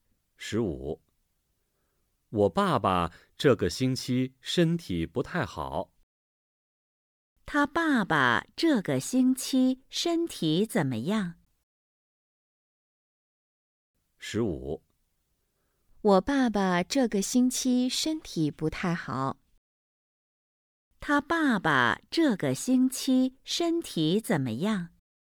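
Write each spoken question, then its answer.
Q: 他爸爸这个星期身体怎么样?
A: 不太好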